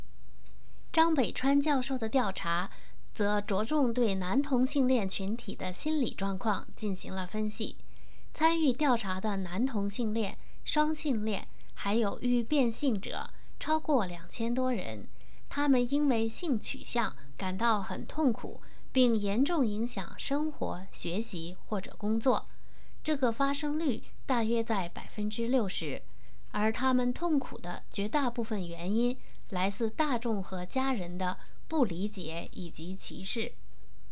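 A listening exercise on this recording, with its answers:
使同性恋者感到痛苦的主要原因是什么?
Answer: 大众和家人的不理解以及歧视

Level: 3rd Year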